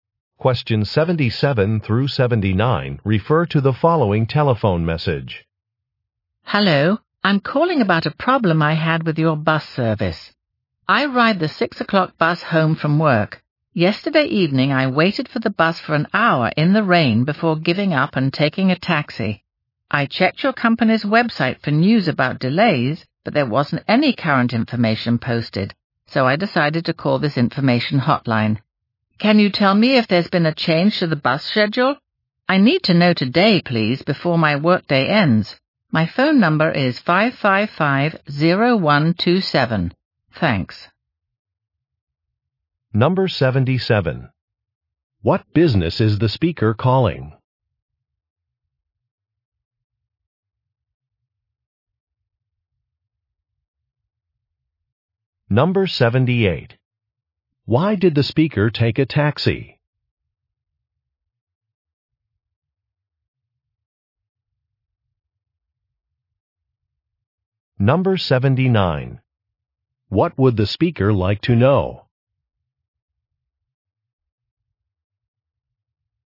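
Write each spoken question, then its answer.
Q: What business is the speaker calling?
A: A bus company

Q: Why did the speaker take a taxi?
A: The bus did not come after an hour of waiting

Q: What would the speaker like to know?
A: Whether the bus schedule has changed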